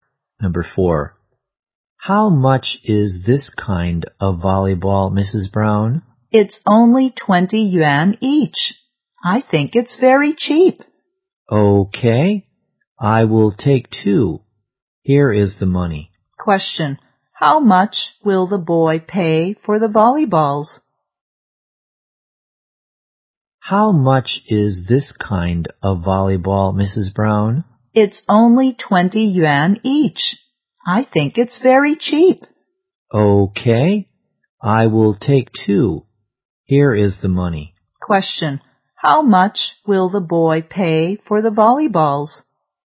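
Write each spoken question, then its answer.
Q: Question. How much will the boy pay for the volleyballs?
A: 40 yuan.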